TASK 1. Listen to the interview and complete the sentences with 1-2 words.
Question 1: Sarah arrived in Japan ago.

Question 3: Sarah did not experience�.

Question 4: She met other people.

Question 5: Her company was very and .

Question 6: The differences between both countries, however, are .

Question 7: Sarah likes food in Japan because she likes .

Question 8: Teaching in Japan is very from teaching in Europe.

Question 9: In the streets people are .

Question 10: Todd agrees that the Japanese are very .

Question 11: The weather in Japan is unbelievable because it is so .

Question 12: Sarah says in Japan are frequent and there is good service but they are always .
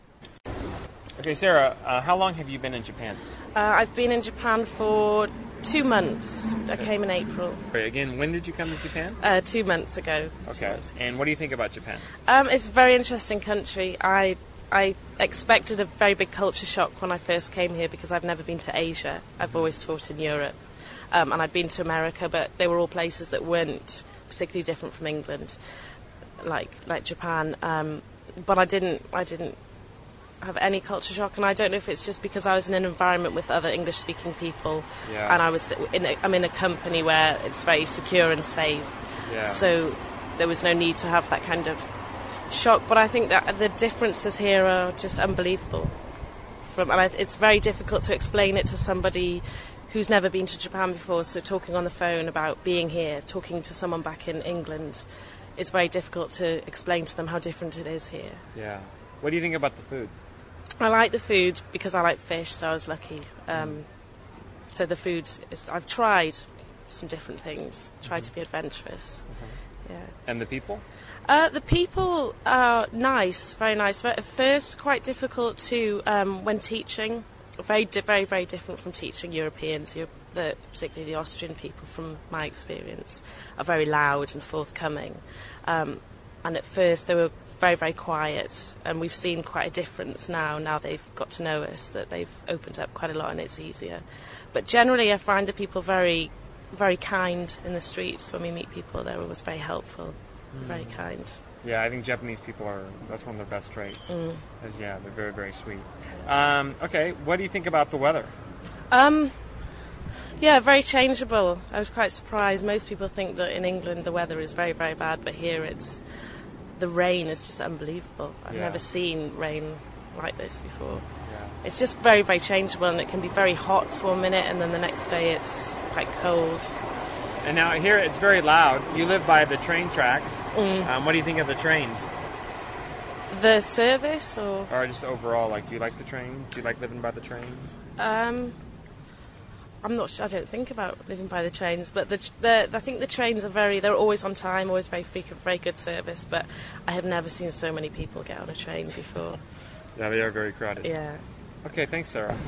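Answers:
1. 2 months
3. culture shock
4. English-speaking
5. secure, safe
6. unbelievable
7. fish
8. different
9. very kind
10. sweet
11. changeable
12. trains, crowded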